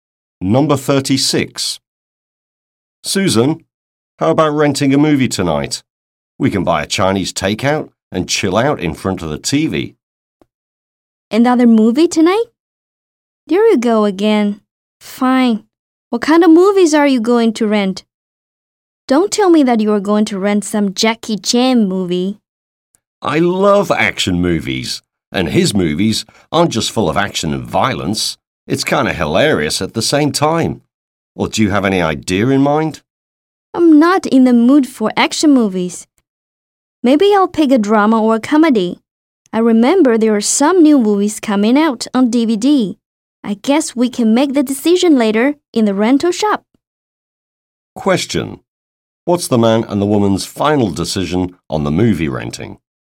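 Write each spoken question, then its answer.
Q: What's the man and the woman's final decision on the movie renting?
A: They will decide later at the rental shop.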